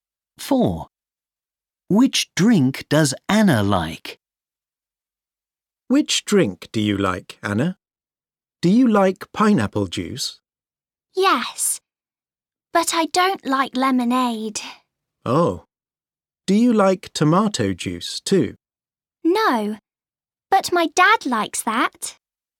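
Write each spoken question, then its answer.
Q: Which drink does Anna like?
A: pineapple juice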